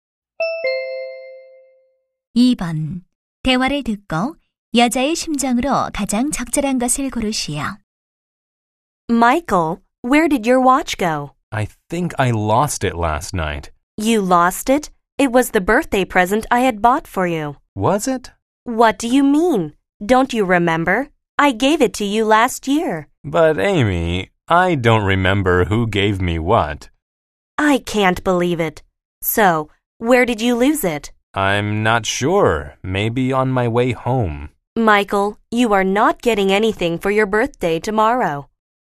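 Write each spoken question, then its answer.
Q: 대화를 듣고 여자의 심정으로 가장 적절한 것을 고르시오.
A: 화가 나고 실망함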